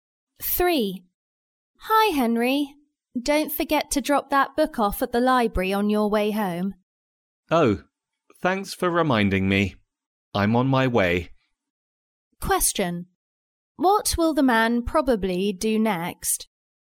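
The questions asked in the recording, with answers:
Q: What will the man probably do next?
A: Drop the book off at the library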